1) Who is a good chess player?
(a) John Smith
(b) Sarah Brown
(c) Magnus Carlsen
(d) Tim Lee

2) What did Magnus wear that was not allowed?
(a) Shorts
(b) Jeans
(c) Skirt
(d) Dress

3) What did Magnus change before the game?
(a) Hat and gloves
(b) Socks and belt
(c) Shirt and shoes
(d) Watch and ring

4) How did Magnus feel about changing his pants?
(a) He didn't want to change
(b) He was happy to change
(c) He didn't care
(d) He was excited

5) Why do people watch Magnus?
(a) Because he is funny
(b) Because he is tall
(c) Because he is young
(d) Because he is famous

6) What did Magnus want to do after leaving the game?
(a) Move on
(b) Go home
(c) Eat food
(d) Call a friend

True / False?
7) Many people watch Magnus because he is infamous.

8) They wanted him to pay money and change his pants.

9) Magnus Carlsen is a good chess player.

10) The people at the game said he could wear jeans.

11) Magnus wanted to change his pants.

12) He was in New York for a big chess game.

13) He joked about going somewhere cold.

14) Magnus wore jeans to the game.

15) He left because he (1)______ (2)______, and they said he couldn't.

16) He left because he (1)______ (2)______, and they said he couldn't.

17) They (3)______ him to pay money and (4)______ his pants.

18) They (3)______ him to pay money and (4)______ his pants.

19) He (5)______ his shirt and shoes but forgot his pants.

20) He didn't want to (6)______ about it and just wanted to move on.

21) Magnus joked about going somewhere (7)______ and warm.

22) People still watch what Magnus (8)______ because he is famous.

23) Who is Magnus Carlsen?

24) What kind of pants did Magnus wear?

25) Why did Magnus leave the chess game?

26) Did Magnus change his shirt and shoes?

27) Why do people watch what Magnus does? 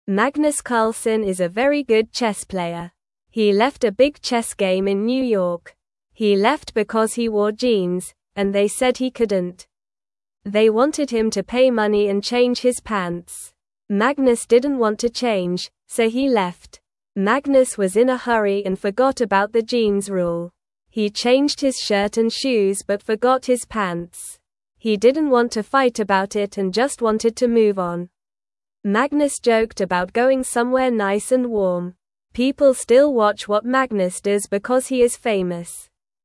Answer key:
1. c
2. b
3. c
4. a
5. d
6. a
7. False
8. True
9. True
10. False
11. False
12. True
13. False
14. True
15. wore
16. jeans
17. wanted
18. change
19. changed
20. fight
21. nice
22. does
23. Magnus Carlsen is a very good chess player.
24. Magnus wore jeans.
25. Magnus left because they said he couldn't wear jeans.
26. Yes, Magnus changed his shirt and shoes.
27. People watch Magnus because he is famous.

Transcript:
Magnus Carlsen is a very good chess player. He left a big chess game in New York. He left because he wore jeans, and they said he couldn't. Magnus didn't want to change, so he left.
Magnus was in a hurry and forgot about the jeans rule. He changed his shirt and shoes but forgot his pants. He didn't want to fight about it and just wanted to move on. Magnus joked about going somewhere nice and warm. People still watch what Magnus does because he is famous.

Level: Level 1

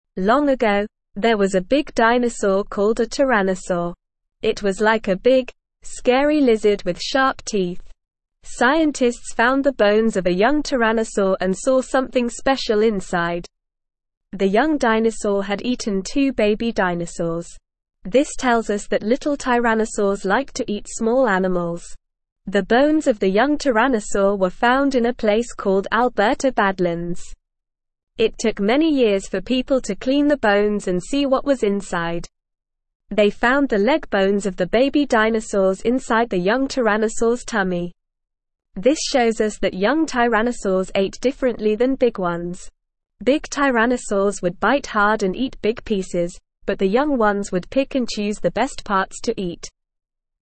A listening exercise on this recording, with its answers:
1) What is the name of the big dinosaur in the story?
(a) lizard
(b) tyrannosaur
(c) dinosaur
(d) sharp teeth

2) What did scientists find inside the young tyrannosaur?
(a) big pieces of meat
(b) bones of baby dinosaurs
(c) sharp teeth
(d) scary lizards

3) Where were the bones of the young tyrannosaur found?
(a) Alberta Badlands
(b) big tyrannosaurs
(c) small animals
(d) sharp teeth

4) How did the young tyrannosaurs eat differently than big ones?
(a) They ate big pieces of meat.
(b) They had sharp teeth.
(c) They liked to eat small animals.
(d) They picked and chose the best parts to eat.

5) What did big tyrannosaurs do when they ate?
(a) They picked and chose the best parts to eat.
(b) They had sharp teeth.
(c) They bit hard and ate big pieces.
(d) They liked to eat small animals.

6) What did the young tyrannosaur eat?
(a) big pieces of meat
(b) small animals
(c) sharp teeth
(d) two baby dinosaurs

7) Where did the young tyrannosaur's bones need to be cleaned?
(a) Alberta Badlands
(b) big tyrannosaurs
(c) small animals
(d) sharp teeth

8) What did the young tyrannosaur's bones show us?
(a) Big tyrannosaurs ate differently than young ones.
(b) Young tyrannosaurs and big tyrannosaurs ate the same.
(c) Young tyrannosaurs ate differently than big ones.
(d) Young tyrannosaurs didn't eat anything.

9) Scientists found the (1)______ of a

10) (2)______ tyrannosaur and saw something special inside.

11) This tells us that (3)______ tyrannosaurs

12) (4)______ to eat small animals.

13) It took many years for people to clean the bones and see what was (5)______.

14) They found the leg bones of the baby (6)______ inside the young tyrannosaur's tummy.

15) Big tyrannosaurs would bite hard and eat big (7)______, but the young ones would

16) (8)______ and choose the best parts to eat.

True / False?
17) Scientists found the feathers of a young dinosaur and saw something ordinary inside.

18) It took many years for people to clean the bones and see what was inside.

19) The young dinosaur had eaten two baby dinosaurs, which tells us that little dinosaurs liked to eat small animals.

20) They found the tail bones of the baby dinosaurs inside the young dinosaur's tummy.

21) This shows us that young dinosaurs ate differently than big ones.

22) Big dinosaurs would bite softly and eat big pieces, but the young ones would pick and choose the worst parts to eat.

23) Long ago, there was a big dinosaur that was like a scary lizard with sharp teeth.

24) The bones of the young dinosaur were found in a place called Alberta Mountains.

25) What was the big dinosaur called?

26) How did the big tyrannosaurs eat?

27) What did the young tyrannosaurs like to eat?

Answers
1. b
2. b
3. a
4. d
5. c
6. d
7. a
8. c
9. bones
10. young
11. little
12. liked
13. inside
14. dinosaurs
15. pieces
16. pick
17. False
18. True
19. True
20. False
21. True
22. False
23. True
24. False
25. The big dinosaur was called a tyrannosaur.
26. The big tyrannosaurs would bite hard and eat big pieces.
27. The young tyrannosaurs liked to eat small animals.

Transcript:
Long ago, there was a big dinosaur called a tyrannosaur. It was like a big, scary lizard with sharp teeth. Scientists found the bones of a young tyrannosaur and saw something special inside. The young dinosaur had eaten two baby dinosaurs. This tells us that little tyrannosaurs liked to eat small animals.
The bones of the young tyrannosaur were found in a place called Alberta Badlands. They found the leg bones of the baby dinosaurs inside the young tyrannosaur's tummy. This shows us that young tyrannosaurs ate differently than big ones. Big tyrannosaurs would bite hard and eat big pieces, but the young ones would pick and choose the best parts to eat.

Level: Level 1

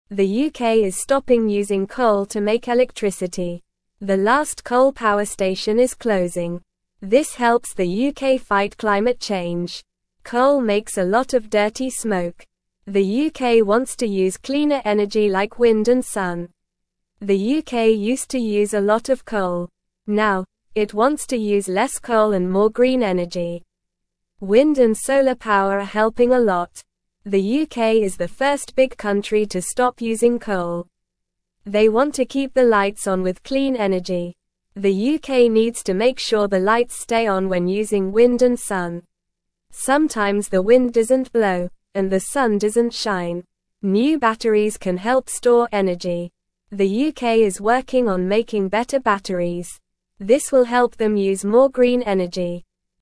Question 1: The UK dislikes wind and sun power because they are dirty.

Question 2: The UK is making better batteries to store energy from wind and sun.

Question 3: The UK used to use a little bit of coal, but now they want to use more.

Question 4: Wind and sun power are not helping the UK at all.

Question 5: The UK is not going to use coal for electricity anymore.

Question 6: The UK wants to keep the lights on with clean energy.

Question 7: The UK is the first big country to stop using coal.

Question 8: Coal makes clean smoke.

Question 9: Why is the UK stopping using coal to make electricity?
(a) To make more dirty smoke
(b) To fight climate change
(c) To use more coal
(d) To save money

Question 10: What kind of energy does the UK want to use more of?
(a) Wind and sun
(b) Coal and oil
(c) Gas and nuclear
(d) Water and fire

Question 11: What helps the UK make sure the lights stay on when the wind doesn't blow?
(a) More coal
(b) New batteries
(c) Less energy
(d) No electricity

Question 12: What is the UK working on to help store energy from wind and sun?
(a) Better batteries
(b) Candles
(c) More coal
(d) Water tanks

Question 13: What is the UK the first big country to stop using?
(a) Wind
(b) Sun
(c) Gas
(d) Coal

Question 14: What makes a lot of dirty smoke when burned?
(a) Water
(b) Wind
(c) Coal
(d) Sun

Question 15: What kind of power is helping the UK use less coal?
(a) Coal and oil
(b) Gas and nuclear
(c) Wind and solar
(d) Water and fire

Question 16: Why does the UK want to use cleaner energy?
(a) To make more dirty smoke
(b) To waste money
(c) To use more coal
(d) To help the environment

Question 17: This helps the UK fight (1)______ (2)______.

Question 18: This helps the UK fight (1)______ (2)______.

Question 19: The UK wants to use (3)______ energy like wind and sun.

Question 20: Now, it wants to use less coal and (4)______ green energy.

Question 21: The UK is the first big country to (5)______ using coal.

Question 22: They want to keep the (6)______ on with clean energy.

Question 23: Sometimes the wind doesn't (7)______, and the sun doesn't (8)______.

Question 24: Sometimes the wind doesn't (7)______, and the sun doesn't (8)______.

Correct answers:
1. False
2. True
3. False
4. False
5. True
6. True
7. True
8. False
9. b
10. a
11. b
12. a
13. d
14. c
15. c
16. d
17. climate
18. change
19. cleaner
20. more
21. stop
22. lights
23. blow
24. shine

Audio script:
The UK is stopping using coal to make electricity. The last coal power station is closing. This helps the UK fight climate change. Coal makes a lot of dirty smoke. The UK wants to use cleaner energy like wind and sun.
The UK used to use a lot of coal. Now, it wants to use less coal and more green energy. Wind and solar power are helping a lot. They want to keep the lights on with clean energy.
The UK needs to make sure the lights stay on when using wind and sun. Sometimes the wind doesn't blow, and the sun doesn't shine. New batteries can help store energy. The UK is working on making better batteries. This will help them use more green energy.

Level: Level 1

